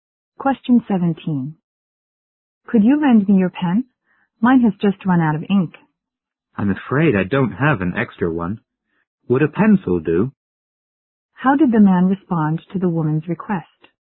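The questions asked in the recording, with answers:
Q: How did the man respond to the woman's request?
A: He offered her a pencil instead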